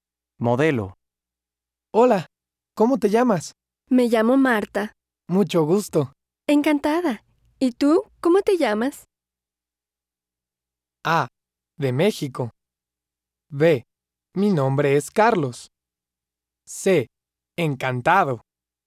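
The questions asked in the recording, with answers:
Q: Encantada. ¿Y tú, cómo te llamas?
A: B: Mi nombre es Carlos.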